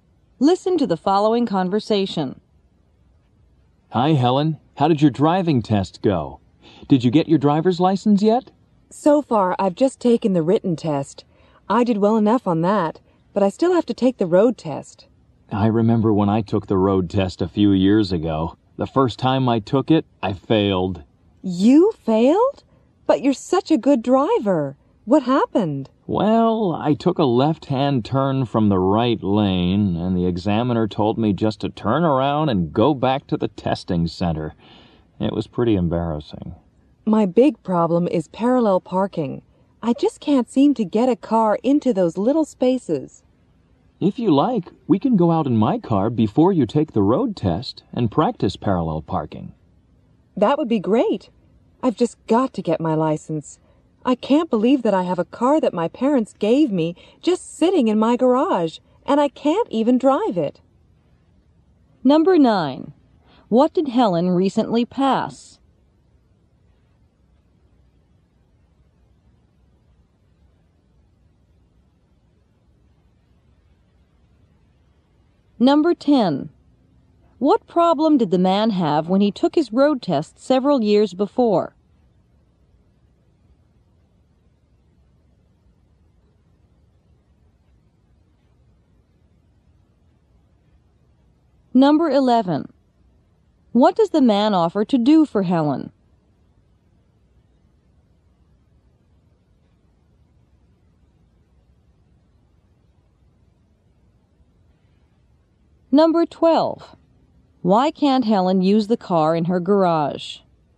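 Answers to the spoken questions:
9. The written driving test
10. He made a left turn from the right lane and failed
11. Practice parallel parking with her in his car
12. She doesn't have her driver's license yet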